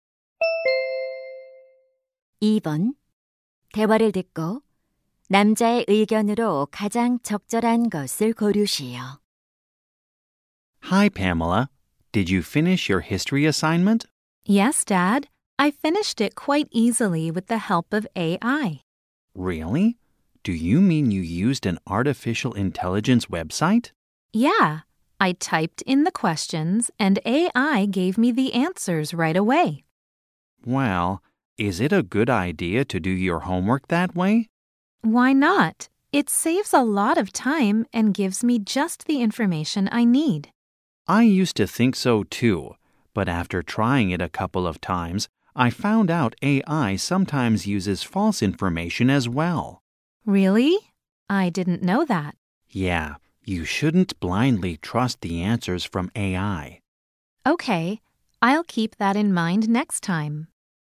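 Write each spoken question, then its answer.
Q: 대화를 듣고 남자의 의견으로 가장 적절한 것을 고르시오.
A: AI가 주는 답을 맹목적으로 믿으면 안 된다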